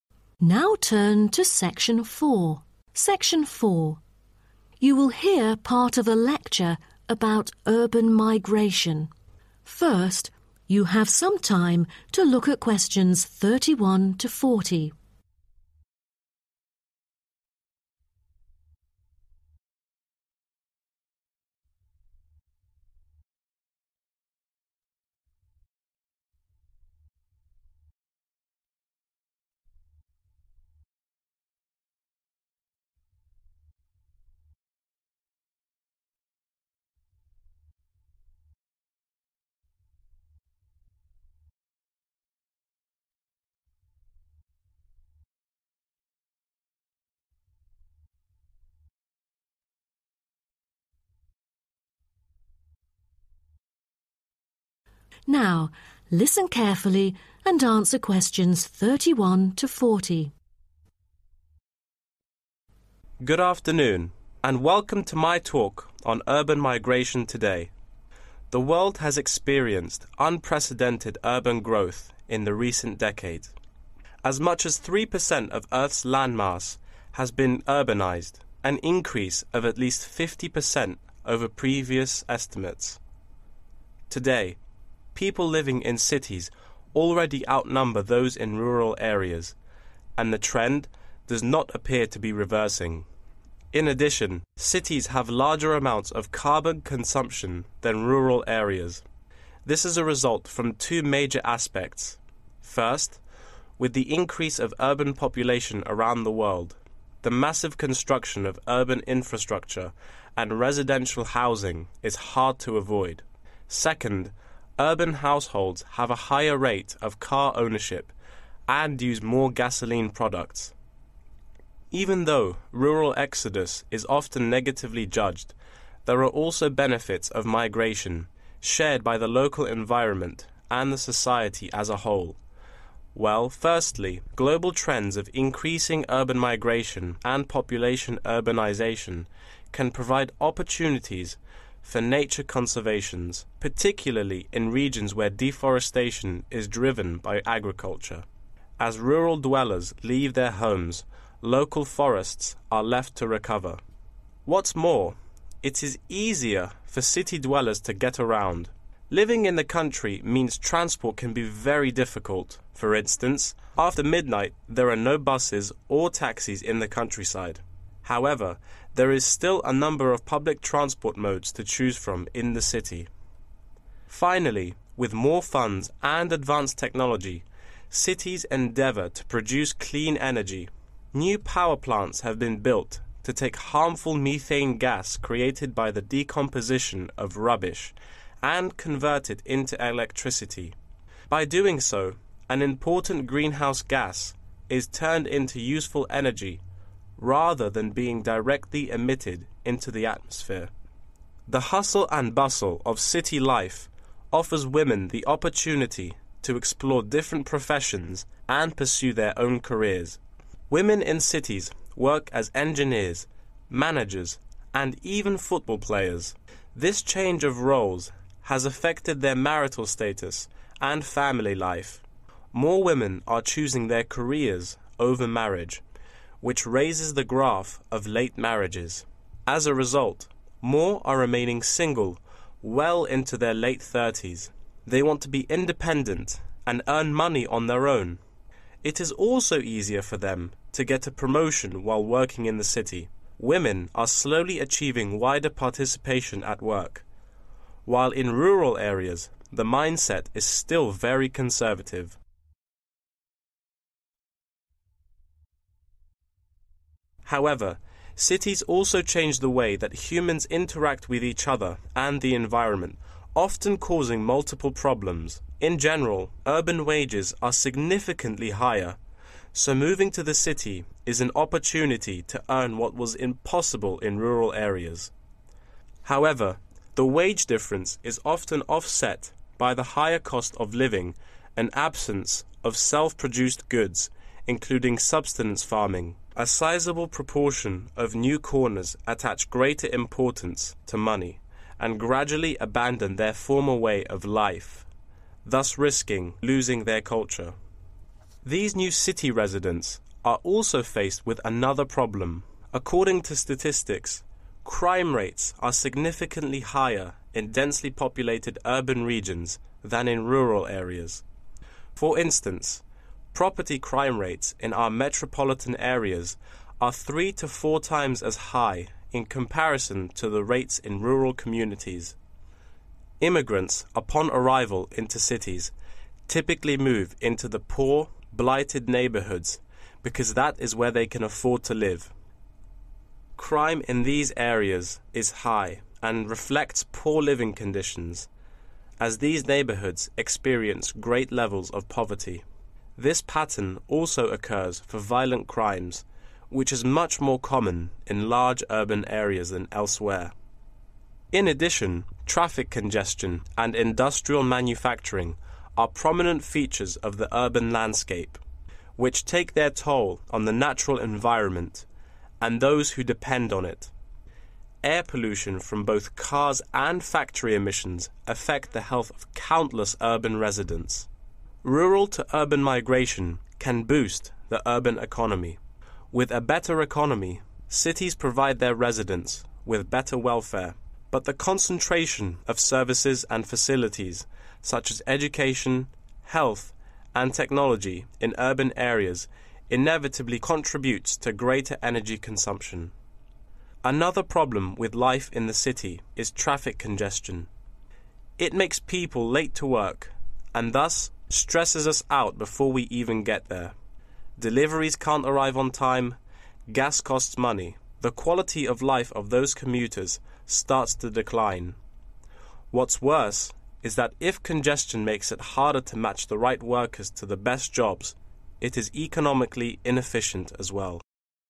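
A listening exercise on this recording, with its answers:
Complete the notes below. Write ONE WORD ONLY for each answer.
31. consume more 31. than the countryside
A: carbon

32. good for some 32. to recover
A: forests

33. poor 33. in the countryside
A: transport

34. clean energy: recycling of methane gas produced from 34.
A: rubbish

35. better chance of getting a 35. at work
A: promotion

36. possible to lose 36. because it is difficult to maintain previous lifestyle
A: culture

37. higher rates of 37. in the city than in the country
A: crime

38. poor quality of 38. in the city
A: air

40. People find the heavy 40. stressful.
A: traffic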